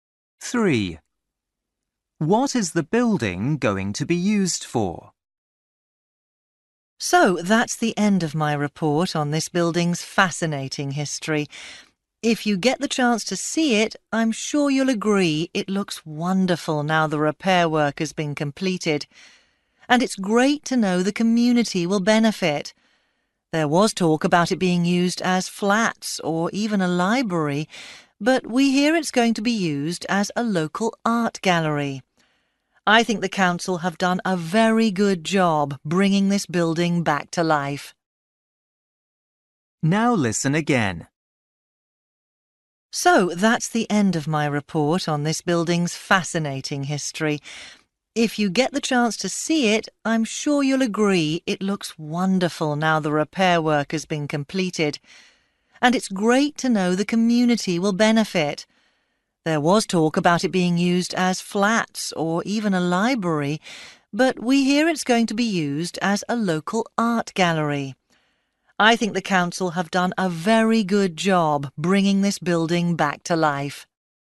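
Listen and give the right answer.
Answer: a local art gallery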